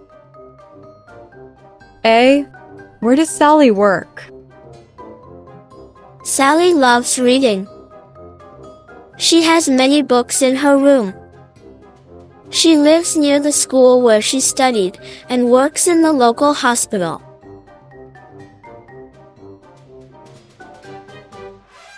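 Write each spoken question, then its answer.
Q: Where does Sally work?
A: In the local hospital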